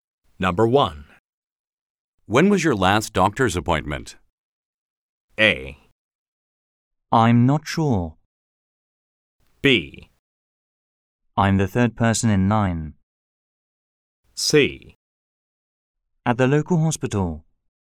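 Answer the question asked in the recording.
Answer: A: I'm not sure.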